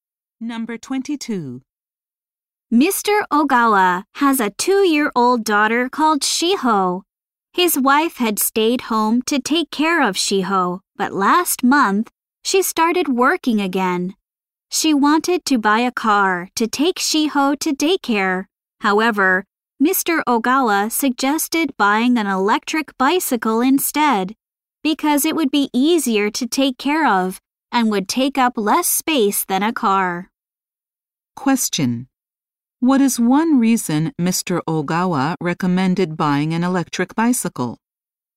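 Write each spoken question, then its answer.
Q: What is one reason Mr. Ogawa recommended buying an electric bicycle?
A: It would be easier to take care of and take up less space than a car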